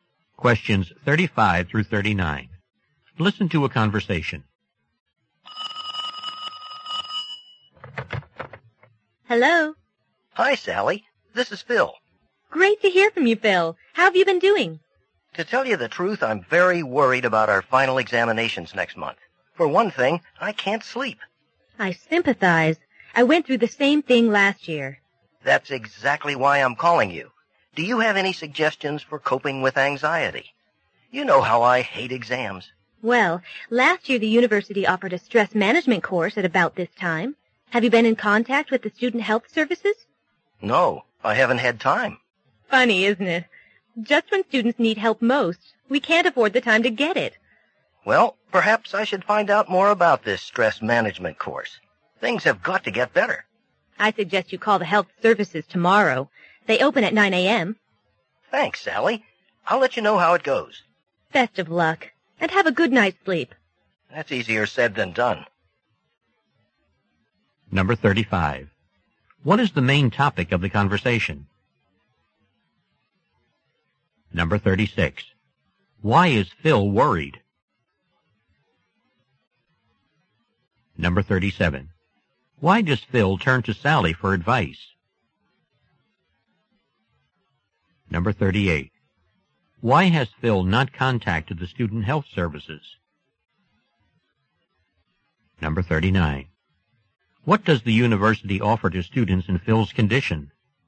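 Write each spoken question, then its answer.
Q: What is the main topic of the conversation?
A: Coping with exam stress

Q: Why is Phil worried?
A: He has final exams next month

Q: Why does Phil turn to Sally for advice?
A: She went through the same thing last year

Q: Why has Phil not contacted the student health services?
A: He hasn't had time

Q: What does the university offer to students in Phil's condition?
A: A stress management course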